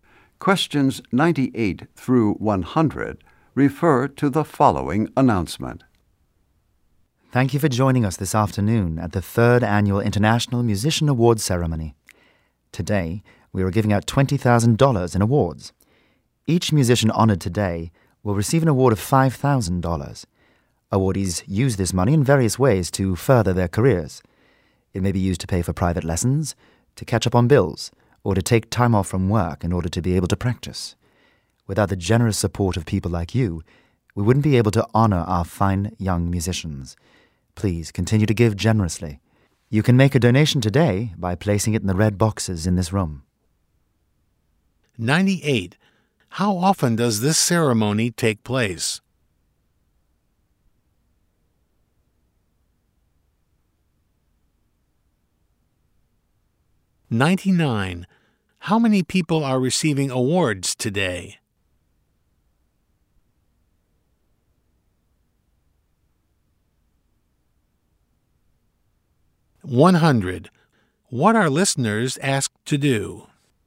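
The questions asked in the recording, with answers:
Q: How often does this ceremony take place?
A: Once a year

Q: How many people are receiving awards today?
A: Four

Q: What are listeners asked to do?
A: Make a donation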